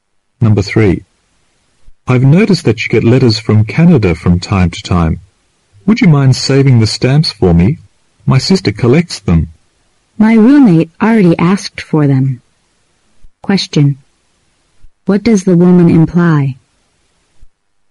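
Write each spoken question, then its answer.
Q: What does the woman imply?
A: She can't save the stamps for him because her roommate already asked for them.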